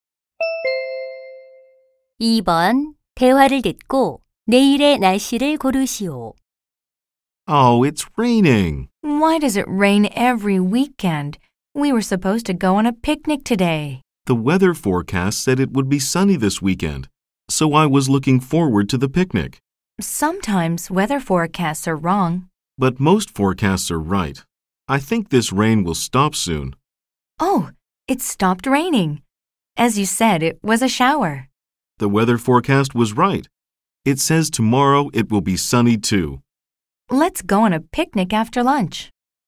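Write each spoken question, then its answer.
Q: 대화를 듣고 내일의 날씨를 고르시오.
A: 맑음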